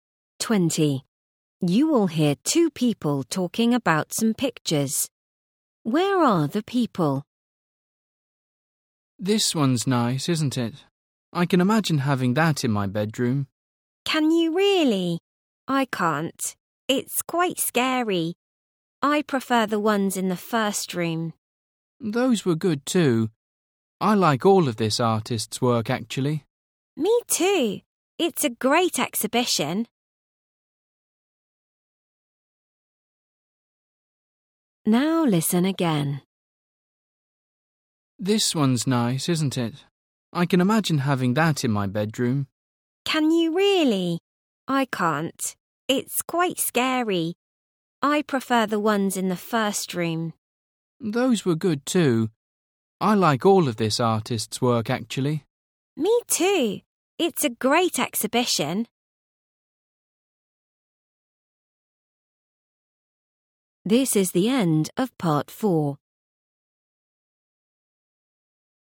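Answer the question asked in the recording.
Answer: At an art exhibition.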